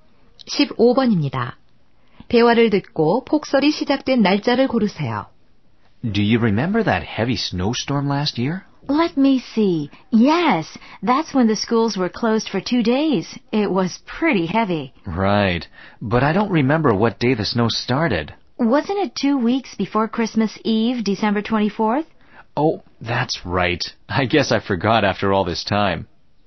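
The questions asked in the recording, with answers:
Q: 대화를 듣고 폭설이 시작된 날짜를 고르세요.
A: 12월 10일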